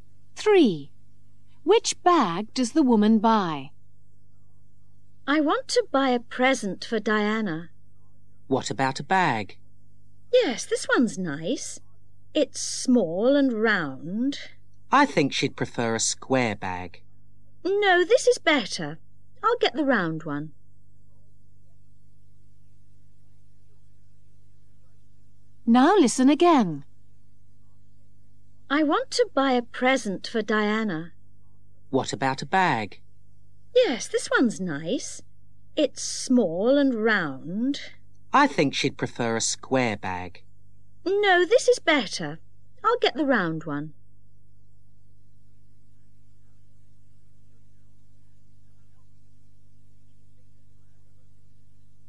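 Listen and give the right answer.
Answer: The small round one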